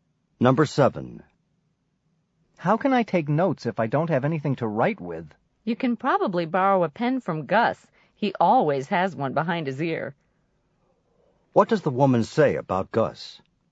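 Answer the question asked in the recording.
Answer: He always has a pen, so she can borrow one from him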